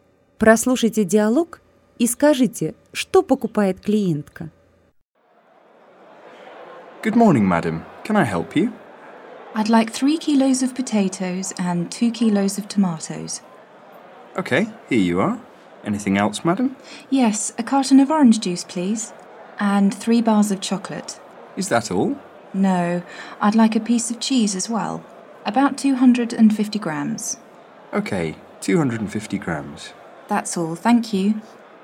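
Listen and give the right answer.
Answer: 3 кг картофеля, 2 кг помидоров, пакет апельсинового сока, 3 плитки шоколада и 250 г сыра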